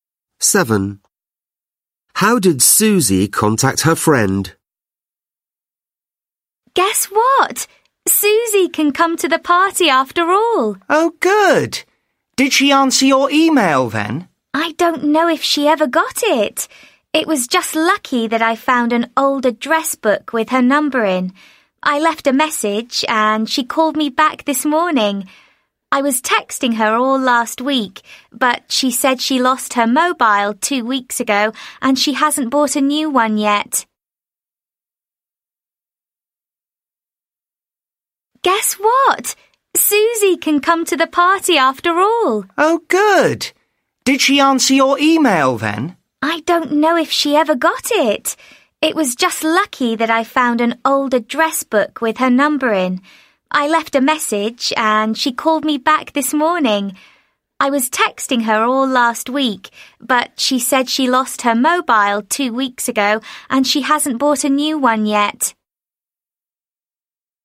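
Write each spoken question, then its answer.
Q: How did Susie contact her friend?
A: She phoned her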